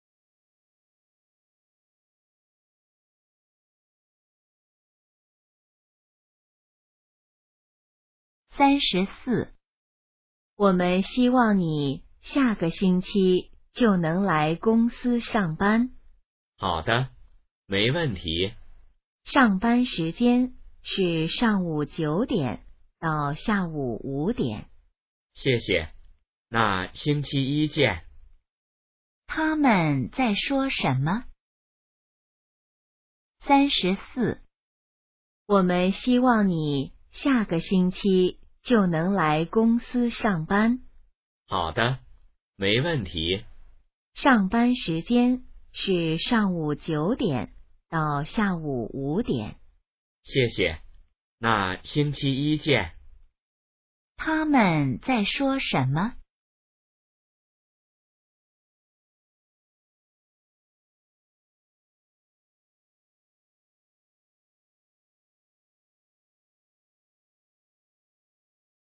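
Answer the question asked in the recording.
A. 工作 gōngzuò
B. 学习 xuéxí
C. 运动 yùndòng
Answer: A. 工作 gōngzuò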